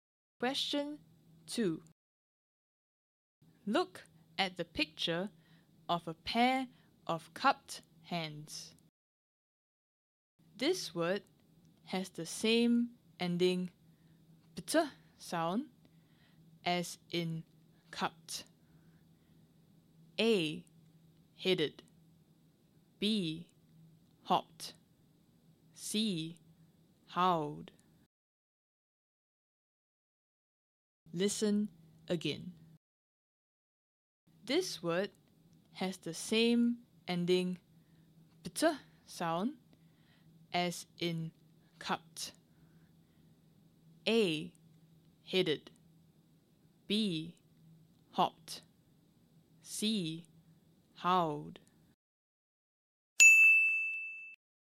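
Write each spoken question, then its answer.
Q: This word has the same ending pt sound as in cupped.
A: B: Hopped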